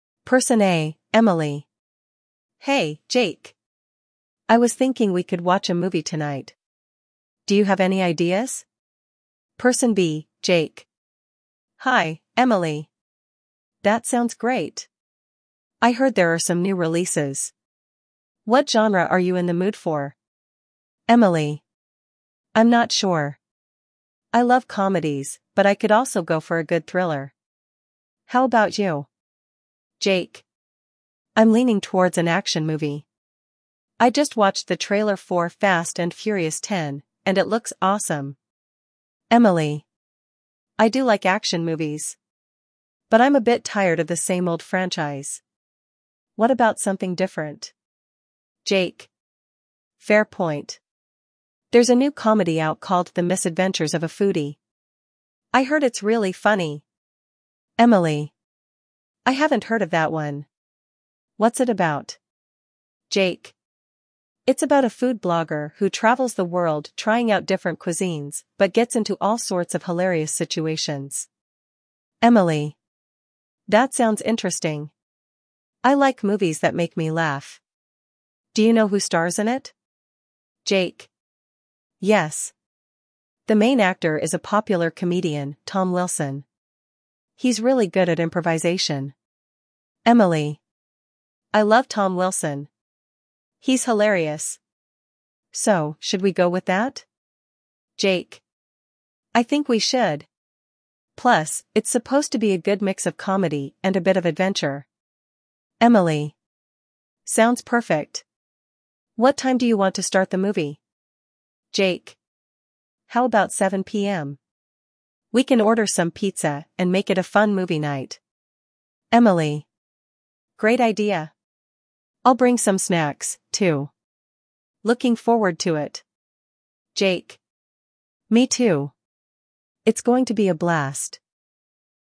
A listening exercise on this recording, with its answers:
You will hear the audio only once, so focus on key details. After listening, select the best answer for each question.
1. What type of movie does Jake initially want to watch?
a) Comedy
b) Drama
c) Action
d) Thriller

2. What movie does Jake suggest?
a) "Fast & Furious 10"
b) "The Misadventures of a Foodie"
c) "Inception"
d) "The Godfather"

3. Why does Emily hesitate about watching the "Fast & Furious" movie?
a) She doesn't like action movies.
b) She is tired of the same old franchise.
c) She already saw it.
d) She prefers thrillers.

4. What is the main plot of "The Misadventures of a Foodie"?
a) A chef competing in a cooking contest.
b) A food blogger traveling and facing funny situations.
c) A family trying to open a restaurant.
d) A couple on a romantic getaway.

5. Who is the main actor in "The Misadventures of a Foodie"?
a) Jake Johnson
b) Tom Wilson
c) Kevin Hart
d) Adam Sandler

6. How does Emily feel about Tom Wilson?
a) She doesn't know him.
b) She dislikes his style.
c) She loves him and finds him hilarious.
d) She thinks he's overrated.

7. What time do Emily and Jake decide to start the movie?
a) 6 PM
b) 7 PM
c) 8 PM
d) 9 PM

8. What food do they plan to order for movie night?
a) Chinese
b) Tacos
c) Pizza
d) Burgers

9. What additional item does Emily plan to bring?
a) Drinks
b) Dessert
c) Snacks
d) Chips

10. How does Jake feel about the movie night?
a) He is indifferent.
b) He is excited.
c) He is bored.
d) He is disappointed.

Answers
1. c) Action
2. a) "Fast & Furious 10"
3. b) She is tired of the same old franchise.
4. b) A food blogger traveling and facing funny situations.
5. b) Tom Wilson
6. c) She loves him and finds him hilarious.
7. b) 7 PM
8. c) Pizza
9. c) Snacks
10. b) He is excited.

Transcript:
[Person A: Emily]
Hey, Jake! I was thinking we could watch a movie tonight. Do you have any ideas?
[Person B: Jake]
Hi, Emily! That sounds great! I heard there are some new releases. What genre are you in the mood for?
[Emily]
I'm not sure. I love comedies, but I could also go for a good thriller. How about you?
[Jake]
I'm leaning towards an action movie. I just watched the trailer for "Fast & Furious 10," and it looks awesome!
[Emily]
I do like action movies! But I'm a bit tired of the same old franchise. What about something different?
[Jake]
Fair point. There's a new comedy out called "The Misadventures of a Foodie." I heard it's really funny!
[Emily]
I haven't heard of that one. What's it about?
[Jake]
It's about a food blogger who travels the world trying out different cuisines but gets into all sorts of hilarious situations.
[Emily]
That sounds interesting! I like movies that make me laugh. Do you know who stars in it?
[Jake]
Yes! The main actor is a popular comedian, Tom Wilson. He's really good at improvisation.
[Emily]
I love Tom Wilson! He's hilarious! So, should we go with that?
[Jake]
I think we should! Plus, it's supposed to be a good mix of comedy and a bit of adventure.
[Emily]
Sounds perfect! What time do you want to start the movie?
[Jake]
How about 7 PM? We can order some pizza and make it a fun movie night.
[Emily]
Great idea! I'll bring some snacks, too. Looking forward to it!
[Jake]
Me too! It's going to be a blast.

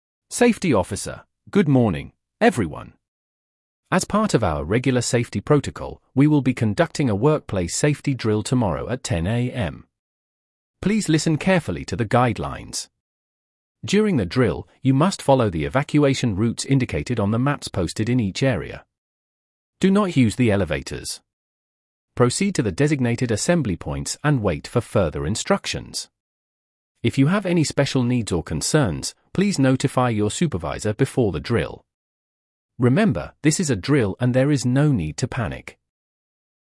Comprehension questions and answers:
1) When will the workplace safety drill take place?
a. Tomorrow at 9:00 AM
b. Tomorrow at 10:00 AM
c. Today at 10:00 AM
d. Next week at 10:00 AM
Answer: b. Tomorrow at 10:00 AM

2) What should employees avoid during the drill?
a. Talking to others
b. Using elevators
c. Walking quickly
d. Taking notes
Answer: b. Using elevators

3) Where should employees go during the drill?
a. To the nearest exit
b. To the designated assembly points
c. To their homes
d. To the cafeteria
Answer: b. To the designated assembly points

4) What should employees do if they have special needs during the drill?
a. Wait until the drill is over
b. Notify their supervisor before the drill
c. Leave the building immediately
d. Follow the usual evacuation routes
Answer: b. Notify their supervisor before the drill

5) How should employees behave during the drill?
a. Panic if they see smoke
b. Follow the instructions calmly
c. Ignore the instructions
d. Evacuate only if they feel unsafe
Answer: b. Follow the instructions calmly

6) What is the purpose of this drill?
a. To test the building's fire alarms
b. To practice evacuation procedures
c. To identify unsafe areas in the building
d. To train employees in first aid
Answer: b. To practice evacuation procedures

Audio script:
Safety Officer: "Good morning, everyone. As part of our regular safety protocol, we will be conducting a workplace safety drill tomorrow at 10:00 AM. Please listen carefully to the guidelines. During the drill, you must follow the evacuation routes indicated on the maps posted in each area. Do not use the elevators. Proceed to the designated assembly points and wait for further instructions. If you have any special needs or concerns, please notify your supervisor before the drill. Remember, this is a drill and there is no need to panic."

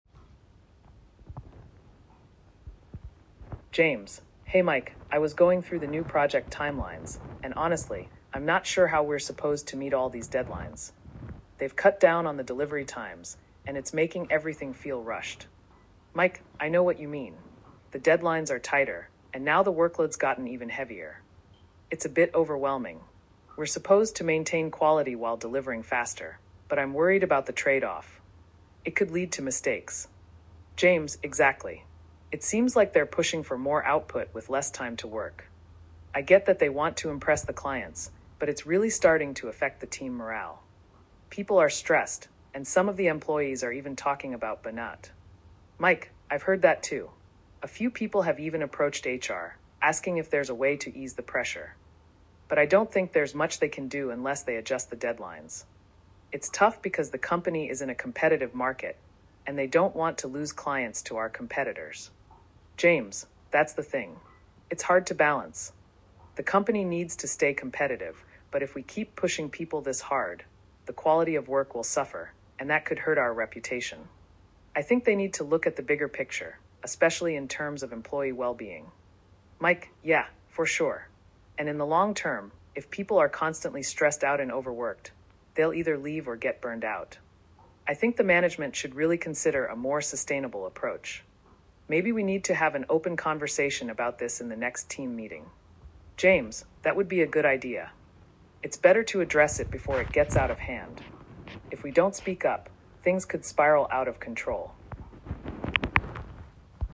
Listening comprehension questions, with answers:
Questions 1 to 5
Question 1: What is James concerned about regarding the new project deadlines?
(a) The deadlines are too long.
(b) The deadlines are unrealistic and rushed.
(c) The deadlines are too far apart.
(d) The team has too much time to complete the project.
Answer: (b) The deadlines are unrealistic and rushed.

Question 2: What is Mike's main concern about the new deadlines?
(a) The team will have to work on weekends.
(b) The team will not have enough resources.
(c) The faster deadlines might lead to mistakes.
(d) The company might lose clients.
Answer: (c) The faster deadlines might lead to mistakes.

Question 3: What has been the reaction of some employees to the increased workload?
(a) They are excited to take on more responsibility.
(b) They are stressed and concerned about burnout.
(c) They feel motivated to meet the new deadlines.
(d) They are planning to leave the company.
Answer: (b) They are stressed and concerned about burnout.

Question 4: What has been suggested by employees to ease the pressure?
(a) A longer workweek.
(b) A change in the project's objectives.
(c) Adjusting the deadlines.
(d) More resources and tools for the team.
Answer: (c) Adjusting the deadlines.

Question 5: What does James believe the company needs to focus on in addition to competitiveness?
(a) Cutting costs on resources.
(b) Improving the product quality.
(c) Employee well-being.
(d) Expanding the team.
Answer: (c) Employee well-being.

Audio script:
James:
Hey Mike, I was going through the new project timelines, and honestly, I'm not sure how we're supposed to meet all these deadlines. They've cut down on the delivery times, and it's making everything feel rushed.
Mike:
I know what you mean. The deadlines are tighter, and now the workload's gotten even heavier. It's a bit overwhelming. We're supposed to maintain quality while delivering faster, but I'm worried about the trade-off. It could lead to mistakes.
James:
Exactly. It seems like they're pushing for more output with less time to work. I get that they want to impress the clients, but it's really starting to affect the team morale. People are stressed, and some of the employees are even talking about burnout.
Mike:
I've heard that too. A few people have even approached HR, asking if there's a way to ease the pressure. But I don't think there's much they can do unless they adjust the deadlines. It's tough because the company is in a competitive market, and they don't want to lose clients to our competitors.
James:
That's the thing. It's hard to balance. The company needs to stay competitive, but if we keep pushing people this hard, the quality of work will suffer, and that could hurt our reputation. I think they need to look at the bigger picture, especially in terms of employee well-being.
Mike:
Yeah, for sure. And in the long term, if people are constantly stressed out and overworked, they'll either leave or get burned out. I think the management should really consider a more sustainable approach. Maybe we need to have an open conversation about this in the next team meeting.
James:
That would be a good idea. It's better to address it before it gets out of hand. If we don't speak up, things could spiral out of control.

